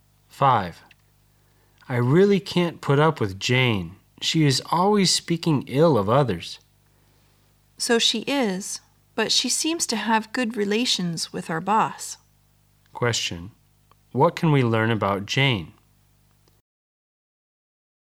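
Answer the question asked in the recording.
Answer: She speaks ill of others but gets along well with the boss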